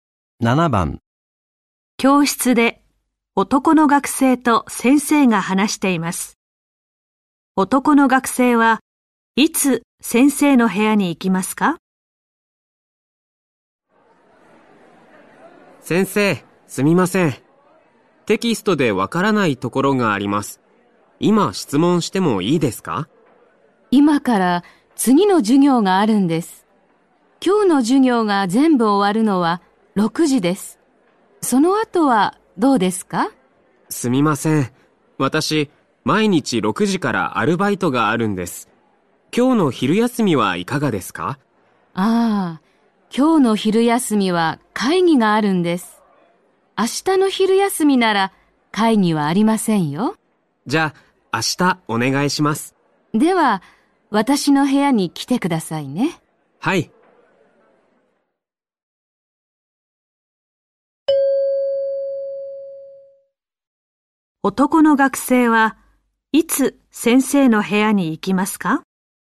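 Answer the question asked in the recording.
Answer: 明日の昼休み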